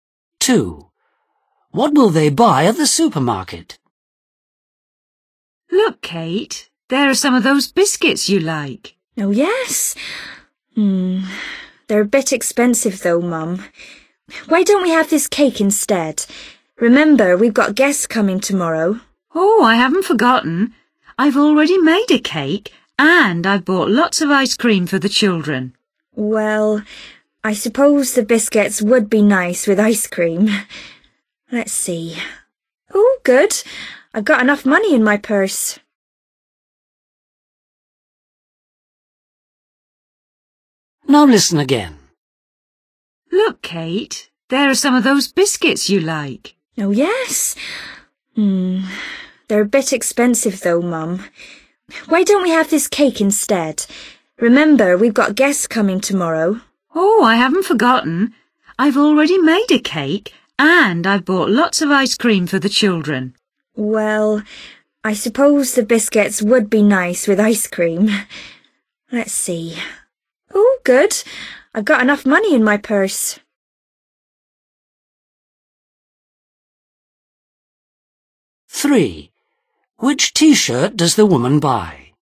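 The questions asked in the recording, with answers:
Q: What will they buy at the supermarket?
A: biscuits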